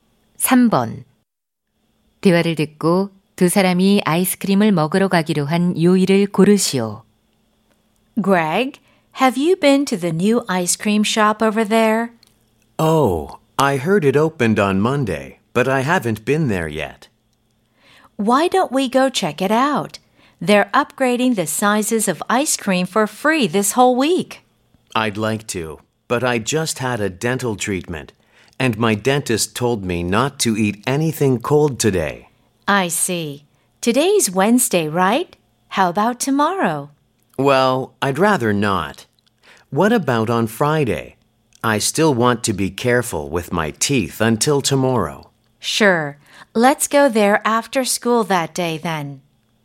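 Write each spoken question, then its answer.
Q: 대화를 듣고 두 사람이 아이스크림을 먹으러 가기로 한 요일을 고르시오.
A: 금요일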